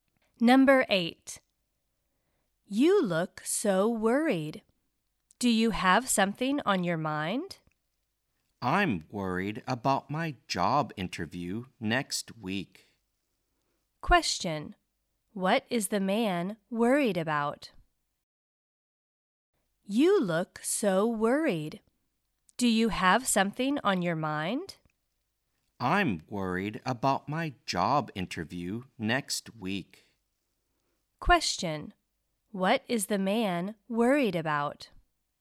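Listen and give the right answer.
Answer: His job interview next week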